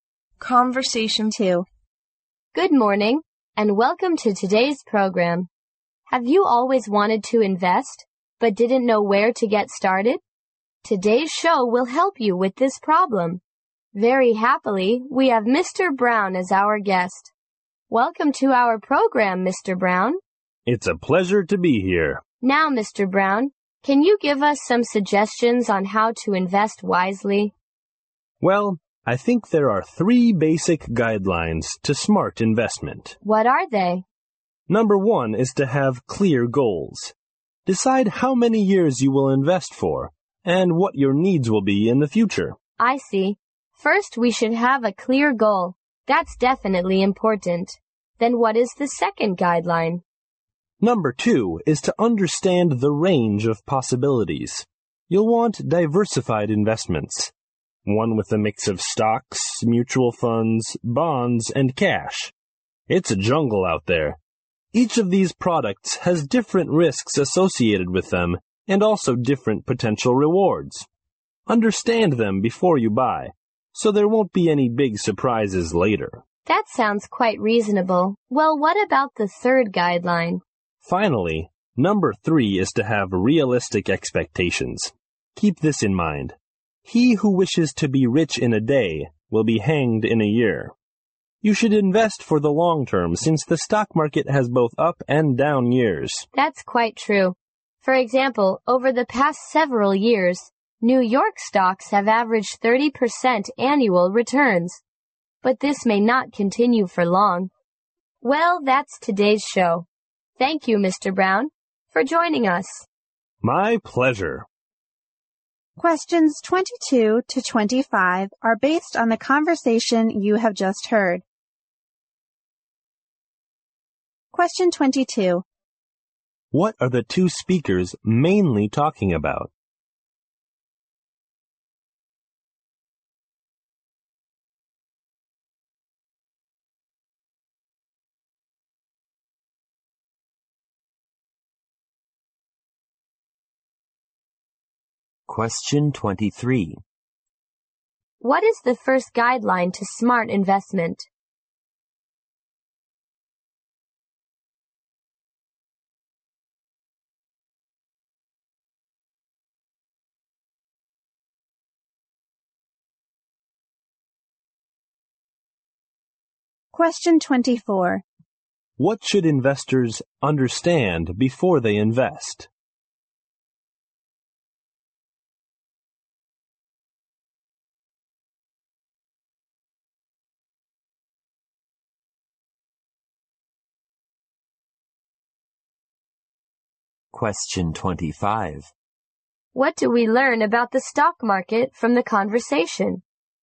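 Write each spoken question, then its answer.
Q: What are the two speakers mainly talking about?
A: How to invest wisely

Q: What is the first guideline to smart investment?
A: Have clear goals

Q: What should investors understand before they invest?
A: The risks and rewards of different products

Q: What do we learn about the stock market from the conversation?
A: It has both up and down years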